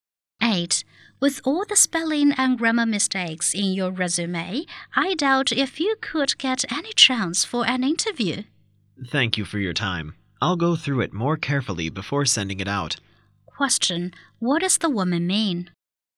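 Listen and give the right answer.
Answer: She will check her resume more carefully before sending it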